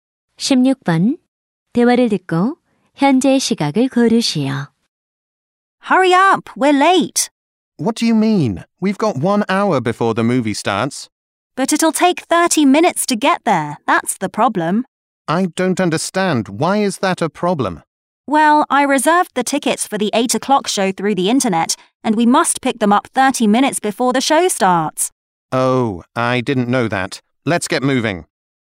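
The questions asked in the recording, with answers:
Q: 대화를 듣고 현재 시각을 고르시오.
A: 7시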